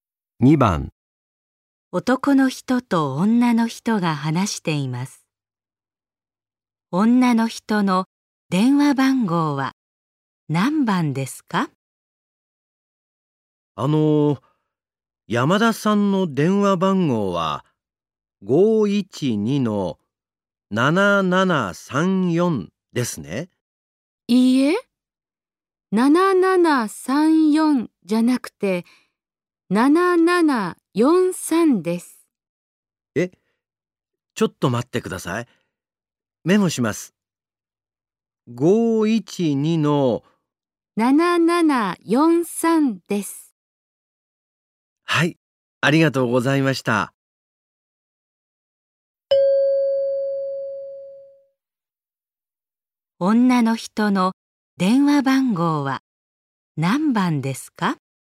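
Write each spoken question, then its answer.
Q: 女の人の電話番号は何番ですか?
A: 512-7743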